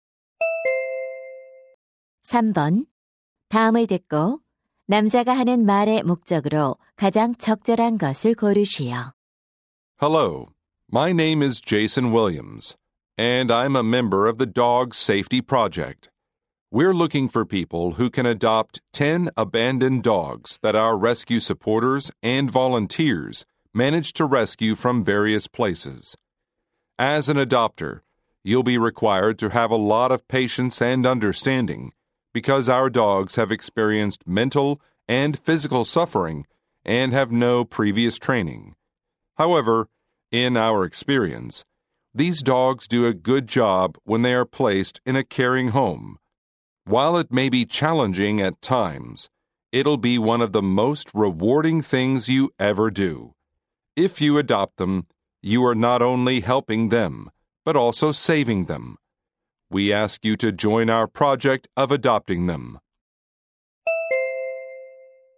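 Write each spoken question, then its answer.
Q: 다음을 듣고 남자가 하는 말의 목적으로 가장 적절한 것을 고르시오.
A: 구조된 유기견 입양 프로젝트 참여를 요청하려고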